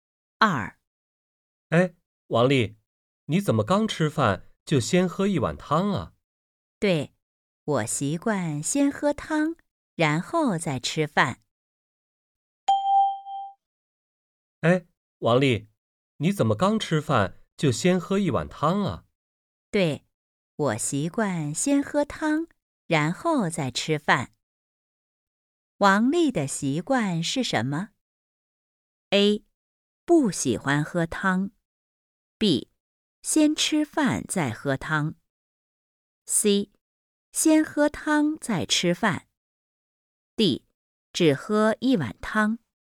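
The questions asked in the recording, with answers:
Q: 王丽的习惯是什么?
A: C: 先喝汤再吃饭。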